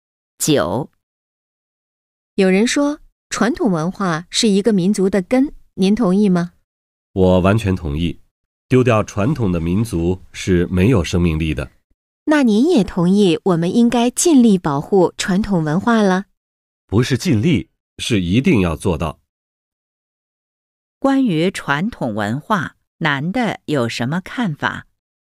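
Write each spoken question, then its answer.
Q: 关于传统文化,男的有什么看法?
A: 一定要保护传统文化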